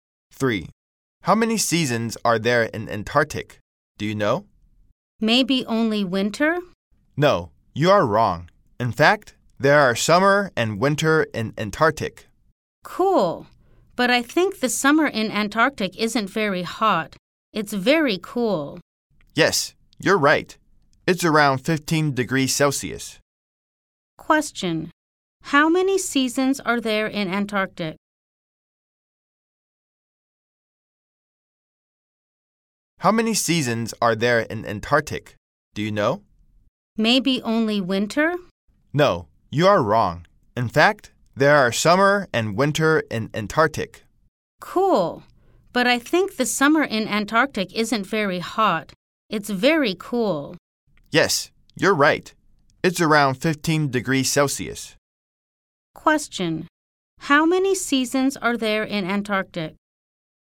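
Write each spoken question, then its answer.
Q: How many seasons are there in Antarctic?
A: Two: summer and winter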